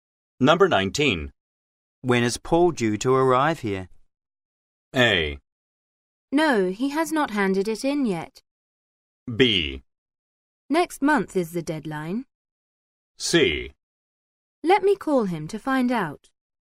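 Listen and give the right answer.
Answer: C: Let me call him to find out.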